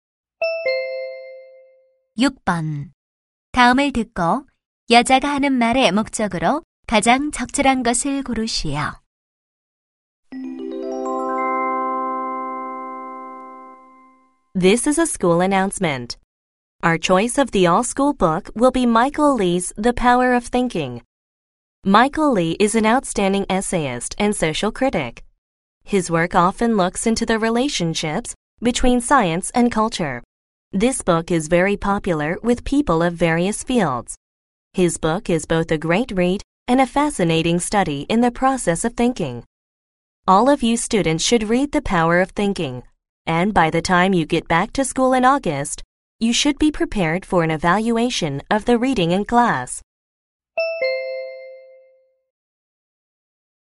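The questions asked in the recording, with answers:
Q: 다음을 듣고 여자가 하는 말의 목적으로 가장 적절한 것을 고르시오.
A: 전교 필독 도서를 안내하고 읽도록 하기 위해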